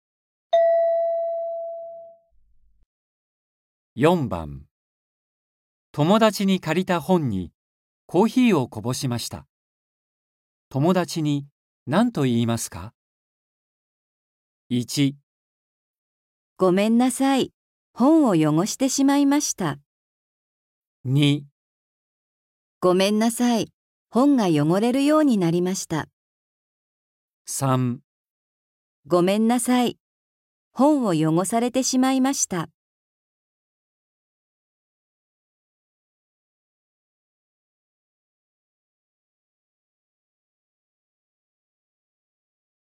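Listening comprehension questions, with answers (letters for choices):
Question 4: 友だちに借りた本にコーヒーをこぼしました。友だちに何と言いますか。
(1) ごめんなさい。本を汚してしまいました。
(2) ごめんなさい。本を汚れるようになりました。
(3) ごめんなさい。本を汚されてしまいました。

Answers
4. 1

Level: N4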